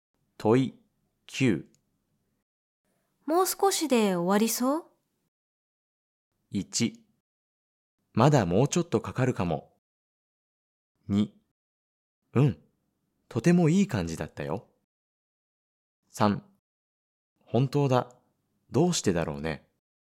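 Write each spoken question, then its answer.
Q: もう少しで終わりそう?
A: 1: まだもうちょっとかかるかも。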